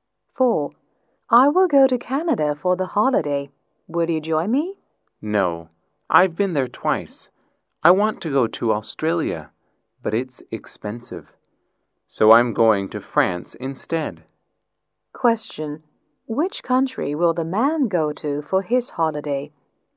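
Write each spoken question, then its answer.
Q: Which country will the man go to for his holiday?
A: France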